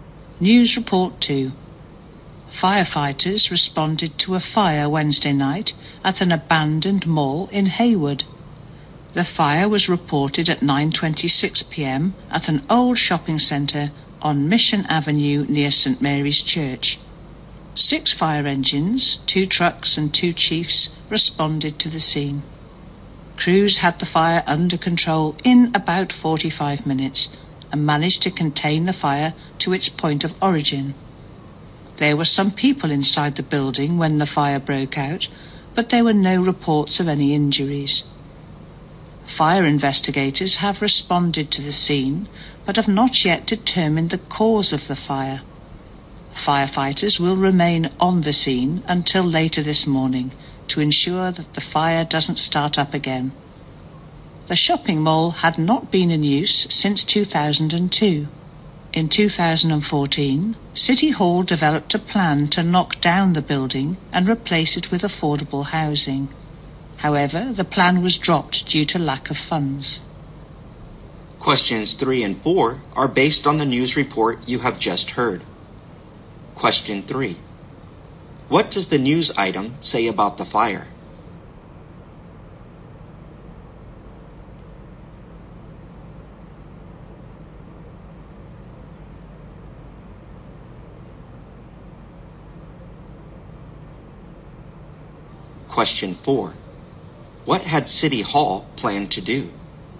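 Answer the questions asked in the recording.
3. No one was reported injured, and it was kept to where it started
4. Knock down the mall and build affordable housing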